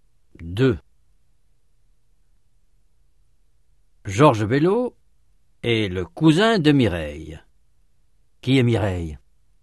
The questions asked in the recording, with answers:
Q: Qui est Mireille?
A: C'est la cousine de Georges.